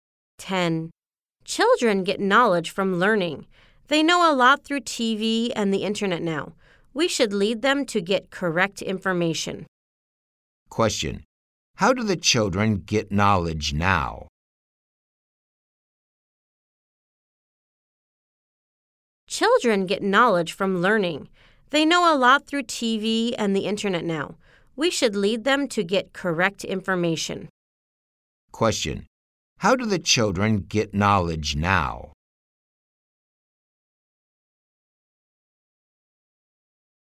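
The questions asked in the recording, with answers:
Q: How do the children get knowledge now?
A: Through TV and the internet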